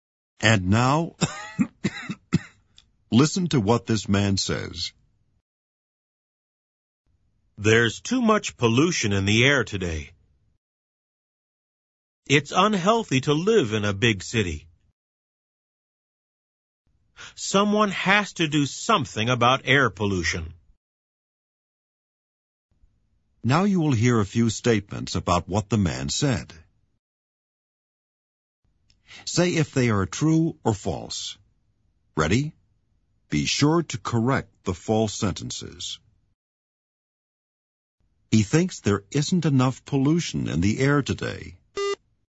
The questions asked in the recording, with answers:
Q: He thinks there isn't enough pollution in the air today.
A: False. He thinks there's too much pollution in the air today.